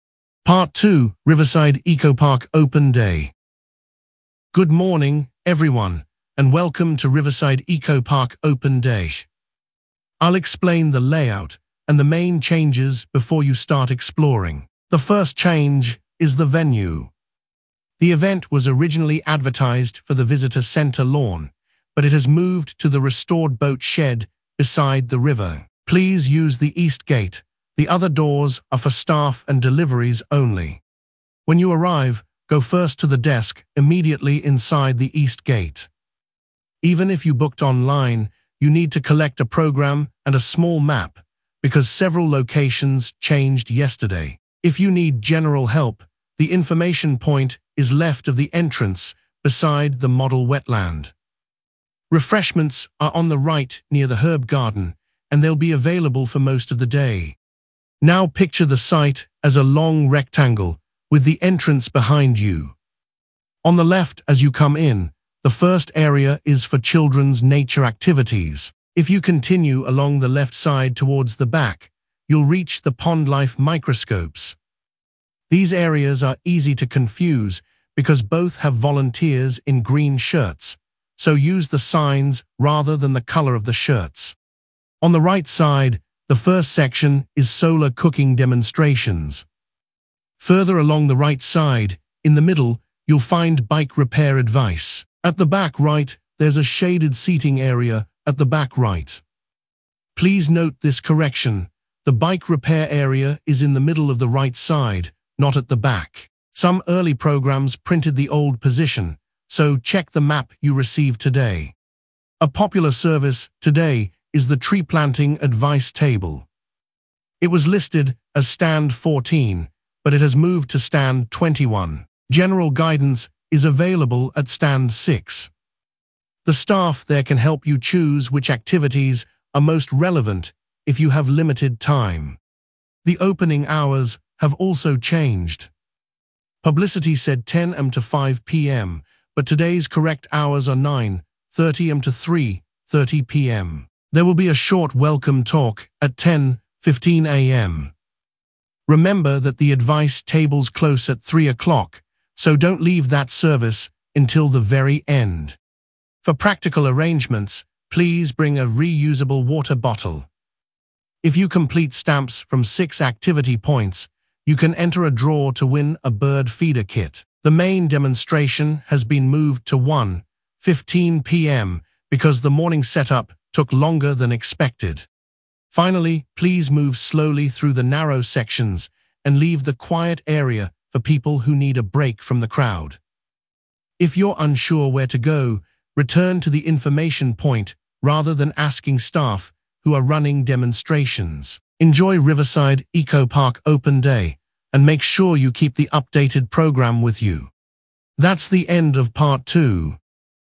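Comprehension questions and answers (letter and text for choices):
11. Where is the event taking place?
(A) the restored boat shed beside the river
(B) the visitor centre lawn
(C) the main library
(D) the sports field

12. Which entrance should visitors use?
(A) main staff entrance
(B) north service door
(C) east gate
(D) rear car park entrance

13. Where should visitors go first?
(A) the cafe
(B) the desk immediately inside the east gate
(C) the quiet area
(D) the final exhibition room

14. Where are refreshments located?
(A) next to the stage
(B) outside the building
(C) beside registration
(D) on the right near the herb garden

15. What is located at the back left?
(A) the pond-life microscopes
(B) children's nature activities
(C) solar cooking demonstrations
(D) a shaded seating area at the back right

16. Where is the quiet or rest area?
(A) front left corner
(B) middle of the right side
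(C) a shaded seating area at the back right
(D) beside the entrance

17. Where has the special advice or clinic table moved to?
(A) stand 14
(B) stand 21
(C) stand 6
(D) the information point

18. What are the correct opening hours?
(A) 10 am to 5 pm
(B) 8 am to midday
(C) noon to 6 pm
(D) 9:30 am to 3:30 pm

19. What must visitors bring?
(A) a reusable water bottle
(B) cash only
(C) a passport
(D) a printed essay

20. What time is the main demonstration now?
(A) 11 am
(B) 10:15 am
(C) 1:15 pm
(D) 3:45 pm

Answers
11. (A) the restored boat shed beside the river
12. (C) east gate
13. (B) the desk immediately inside the east gate
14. (D) on the right near the herb garden
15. (A) the pond-life microscopes
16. (C) a shaded seating area at the back right
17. (B) stand 21
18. (D) 9:30 am to 3:30 pm
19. (A) a reusable water bottle
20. (C) 1:15 pm

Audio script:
Part 2: Riverside Eco-Park Open Day
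Guide: Good morning, everyone, and welcome to Riverside Eco-Park Open Day. I will explain the layout and the main changes before you start exploring. The first change is the venue. The event was originally advertised for the visitor centre lawn, but it has moved to the restored boat shed beside the river. Please use the east gate; the other doors are for staff and deliveries only.
Guide: When you arrive, go first to the desk immediately inside the east gate. Even if you booked online, you need to collect a programme and a small map, because several locations changed yesterday. If you need general help, the information point is left of the entrance beside the model wetland. Refreshments are on the right near the herb garden, and they will be available for most of the day.
Guide: Now picture the site as a long rectangle, with the entrance behind you. On the left as you come in, the first area is for children's nature activities. 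If you continue along the left side towards the back, you will reach the pond-life microscopes. These areas are easy to confuse because both have volunteers in green shirts, so use the signs rather than the colour of the shirts.
Guide: On the right side, the first section is solar cooking demonstrations. Further along the right side, in the middle, you will find bike repair advice. At the back right there is a shaded seating area at the back right. Please note this correction: the bike repair area is in the middle of the right side, not at the back. Some early programmes printed the old position, so check the map you receive today.
Guide: A popular service today is the tree-planting advice table. It was listed as stand 14, but it has moved to stand 21. General guidance is available at stand 6. The staff there can help you choose which activities are most relevant if you have limited time.
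Guide: The opening hours have also changed. Publicity said 10 am to 5 pm, but today's correct hours are 9:30 am to 3:30 pm. There will be a short welcome talk at 10:15 am. Remember that the advice tables close at three o'clock, so do not leave that service until the very end.
Guide: For practical arrangements, please bring a reusable water bottle. If you complete stamps from six activity points, you can enter a draw to win a bird feeder kit. The main demonstration has been moved to 1:15 pm because the morning setup took longer than expected.
Guide: Finally, please move slowly through the narrow sections and leave the quiet area for people who need a break from the crowd. If you are unsure where to go, return to the information point rather than asking staff who are running demonstrations. Enjoy Riverside Eco-Park Open Day, and make sure you keep the updated programme with you.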